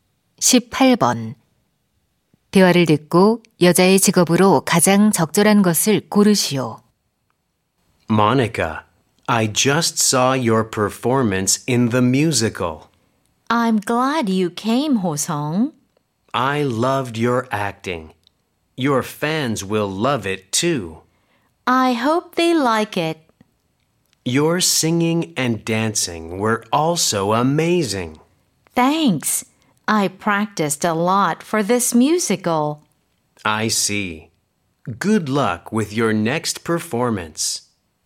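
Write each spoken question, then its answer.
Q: 대화를 듣고 여자의 직업으로 가장 적절한 것을 고르시오.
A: 뮤지컬 배우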